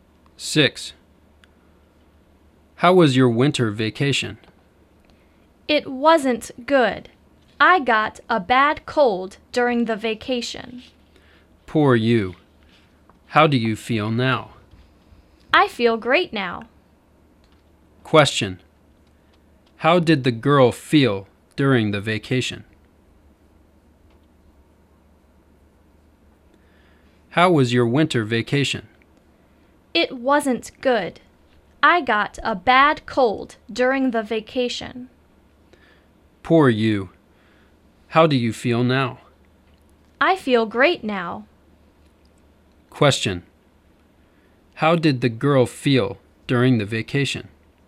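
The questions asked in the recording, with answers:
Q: How did the girl feel during the vacation?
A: She felt bad; she had a bad cold.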